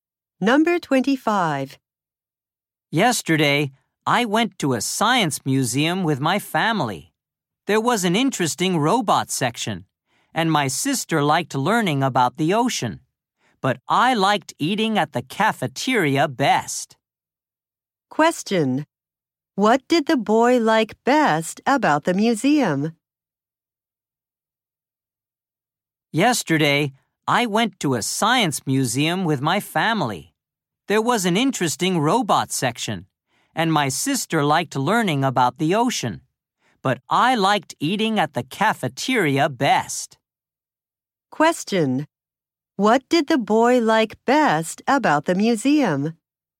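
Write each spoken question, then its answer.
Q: What did the boy like best about the museum?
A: Eating at the cafeteria.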